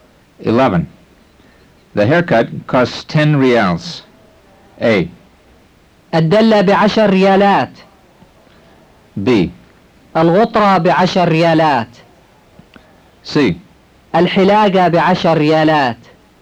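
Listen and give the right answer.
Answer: C: الحلاقة بعشر ريالات.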